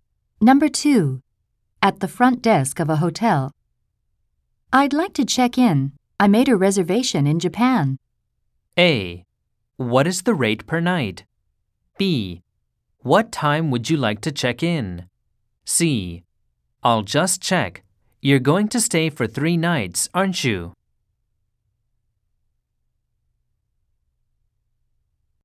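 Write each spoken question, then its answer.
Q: I'd like to check in. I made a reservation in Japan.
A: C: I'll just check. You're going to stay for 3 nights, aren't you?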